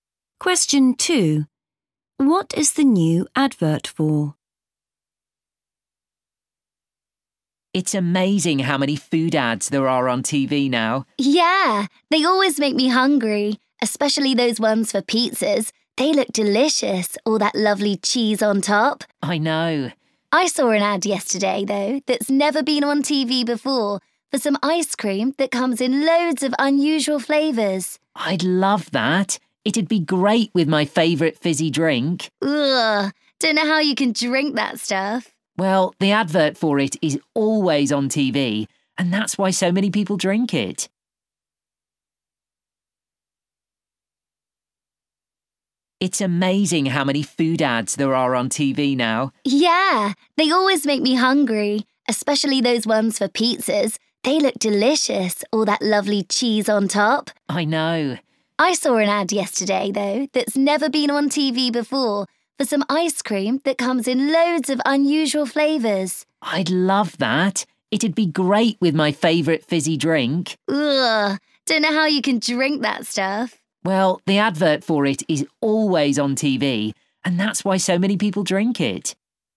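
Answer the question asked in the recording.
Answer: ice cream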